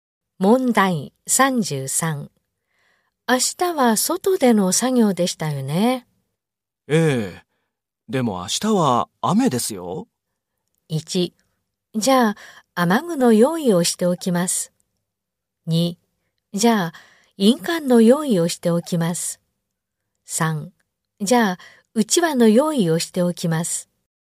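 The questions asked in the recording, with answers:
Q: 明日は外での作業でしたよね。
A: 1: じゃあ、雨具の用意をしておきます。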